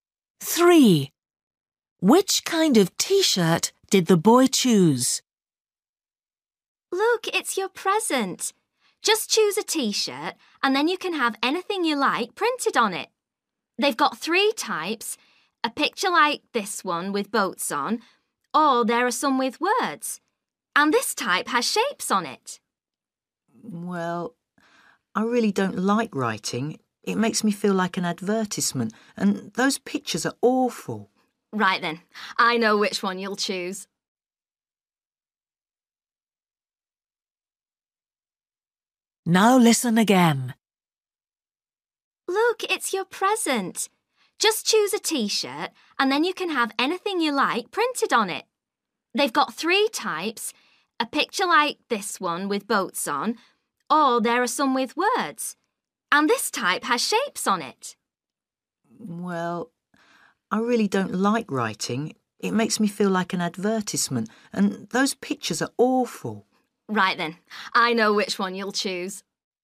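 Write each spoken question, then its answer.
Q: Which kind of T-shirt did the boy choose?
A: one with shapes on it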